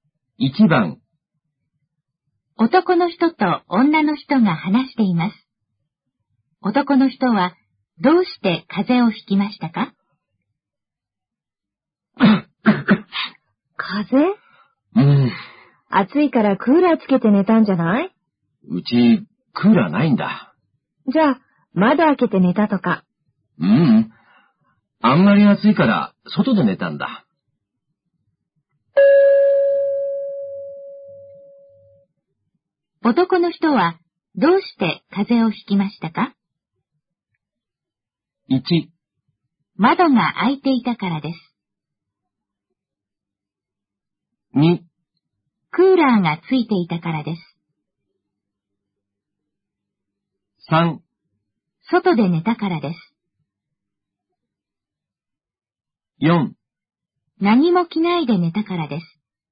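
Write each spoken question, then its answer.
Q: 男の人はどうして風邪をひきましたか?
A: 3: 外で寝たからです。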